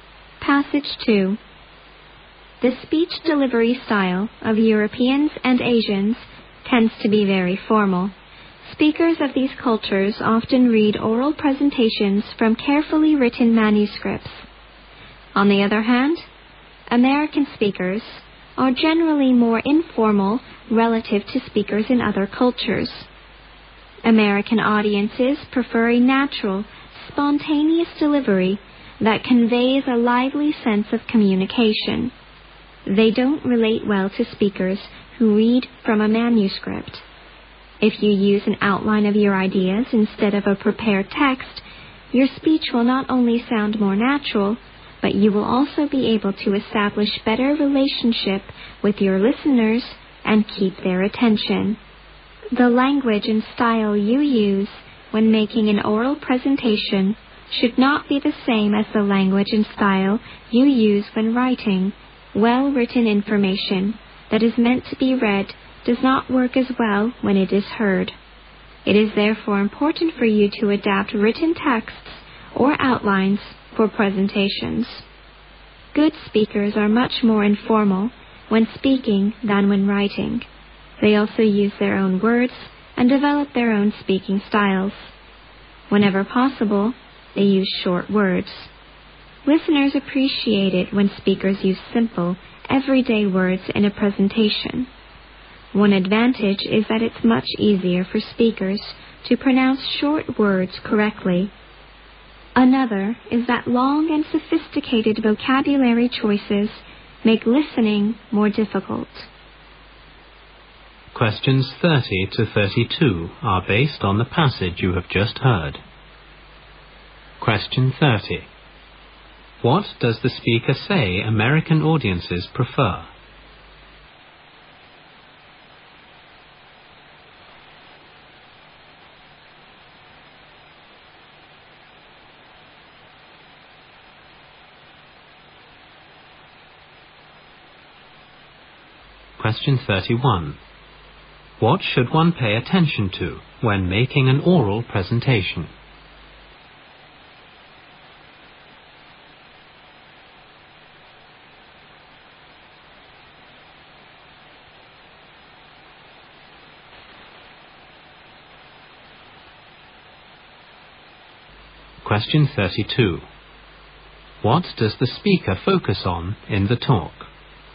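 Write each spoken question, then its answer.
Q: What does the speaker say American audiences prefer?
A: A natural, spontaneous delivery

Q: What does the speaker focus on in the talk?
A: Speech delivery style in oral presentations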